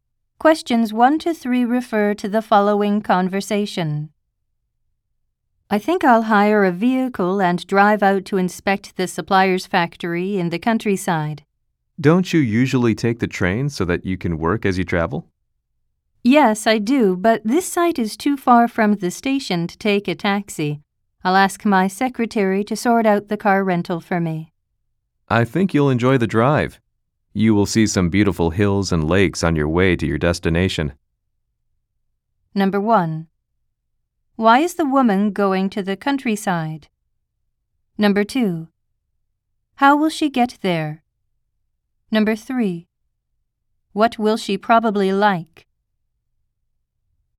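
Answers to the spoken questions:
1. To inspect the supplier's factory
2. By driving a rented car
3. The scenery of hills and lakes on the drive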